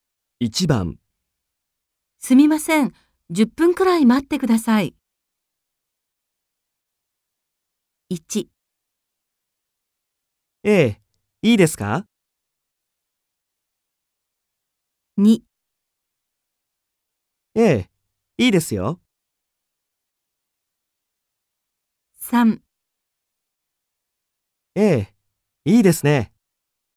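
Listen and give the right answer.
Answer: 2: ええ、いいですよ。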